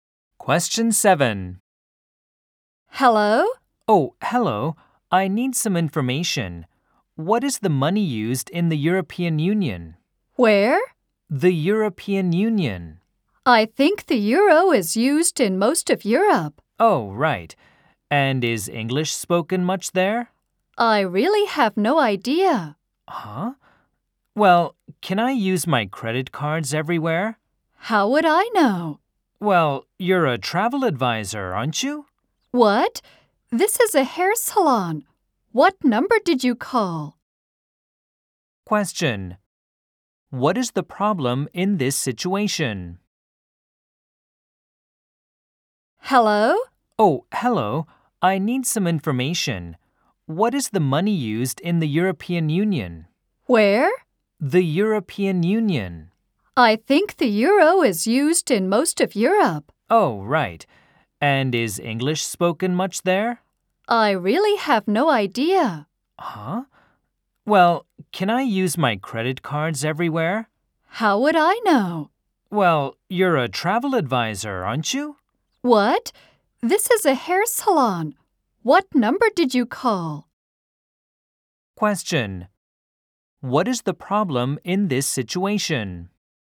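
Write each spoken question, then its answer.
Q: What is the problem in this situation?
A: The caller called a hair salon instead of a travel advisor (wrong number)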